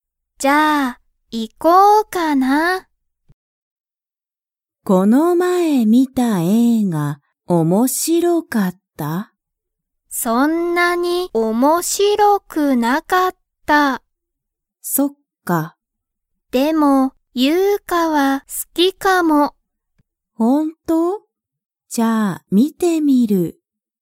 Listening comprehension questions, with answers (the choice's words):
その映画(えいが)は面白(おもしろ)かったですか?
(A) はい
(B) いいえ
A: いいえ

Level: Level 1